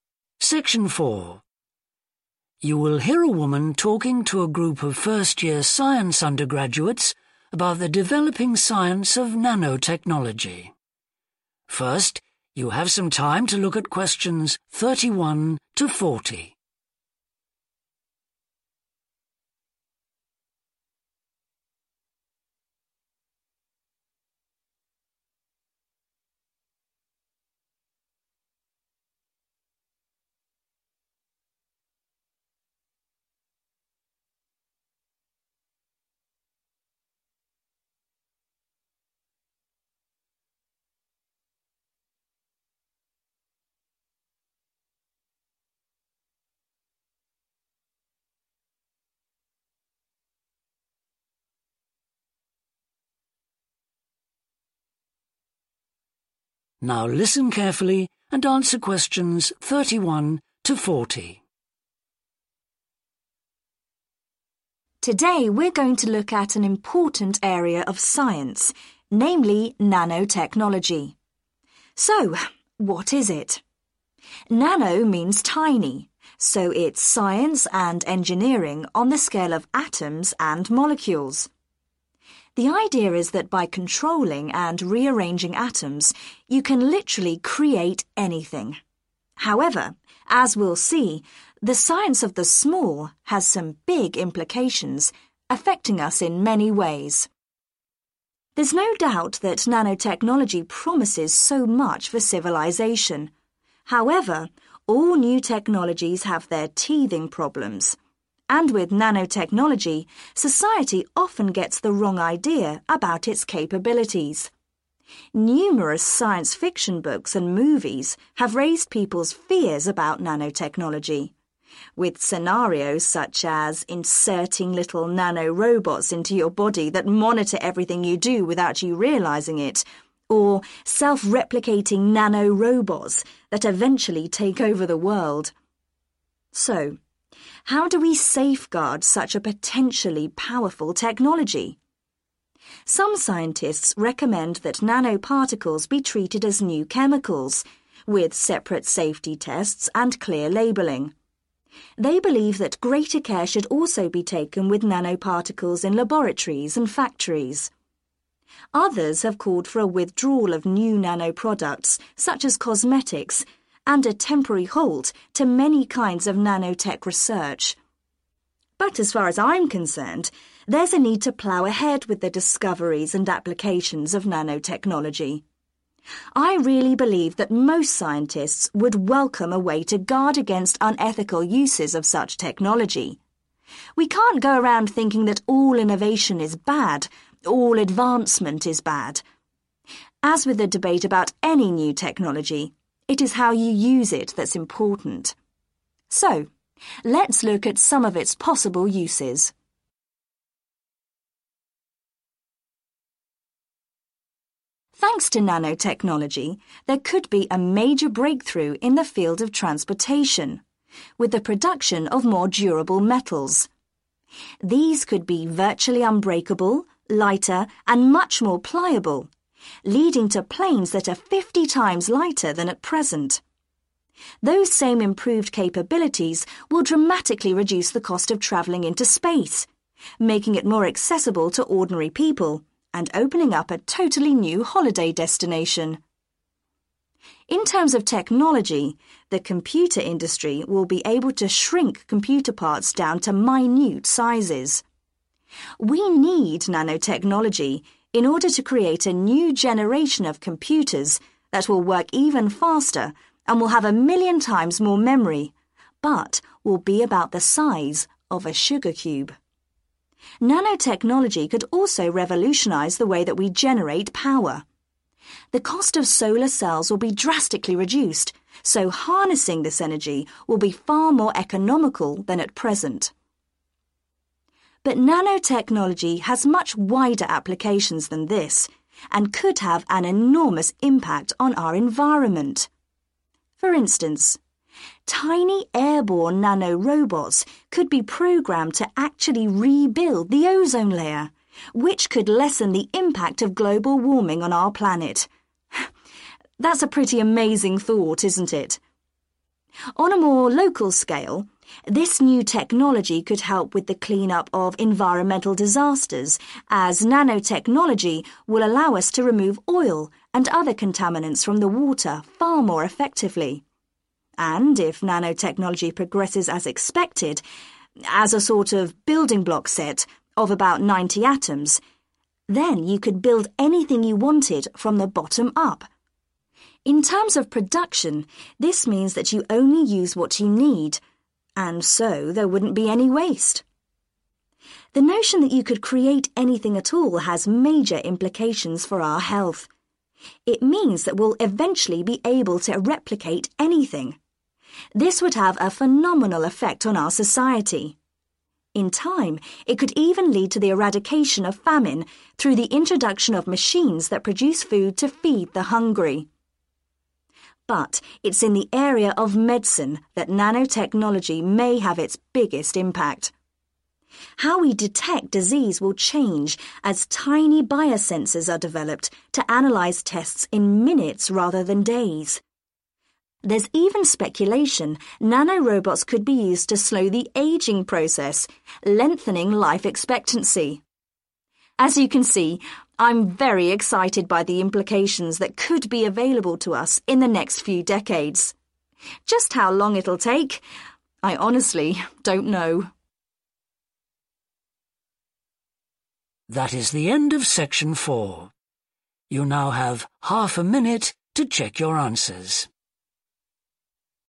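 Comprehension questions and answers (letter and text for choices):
Choose the correct letter; A, В or C.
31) The speaker says that one problem with nanotechnology is that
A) it could threaten our way of life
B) it could be used to spy on people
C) it is misunderstood by the public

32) According to the speaker, some scientists believe that nano-particles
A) should be restricted to secure environments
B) should be used with more caution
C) should only be developed for essential products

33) In the speaker's opinion, research into nanotechnology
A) has yet to win popular support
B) could be seen as unethical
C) ought to be continued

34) Nanotechnology could allow the development of stronger 34....................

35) 35..................... travel will be made available to the masses.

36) Computers will be even smaller, faster, and will have a greater 36................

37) 37............... 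energy will become more affordable.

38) Pollutants such as 38................ could be removed from water more easily.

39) There will be no 39............. from manufacturing.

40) Analysis of medical 40............... will be sped up.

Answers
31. C) it is misunderstood by the public
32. B) should be used with more caution
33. C) ought to be continued
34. metals
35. space
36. memory
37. solar
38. oil
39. waste
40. tests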